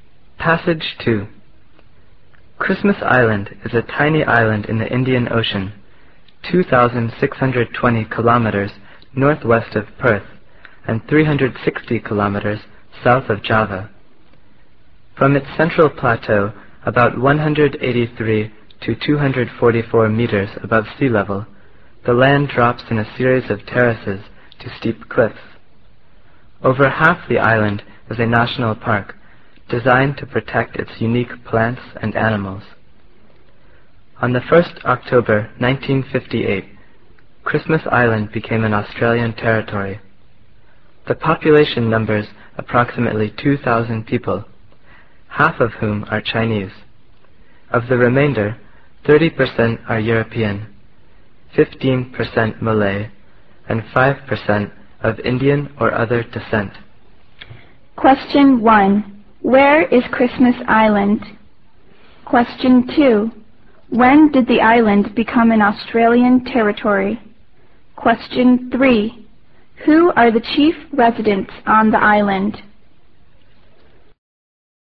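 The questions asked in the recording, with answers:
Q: Where is Christmas Island?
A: In the Indian Ocean, 2,620 km northwest of Perth and 360 km south of Java

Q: When did the island become an Australian territory?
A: On 1 October 1958

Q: Who are the chief residents on the island?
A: Chinese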